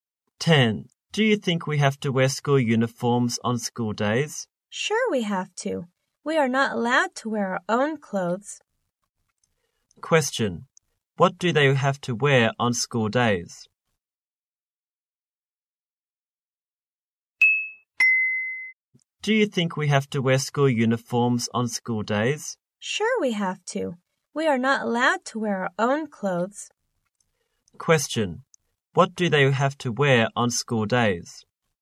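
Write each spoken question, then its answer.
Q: What do they have to wear on school days?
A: School uniforms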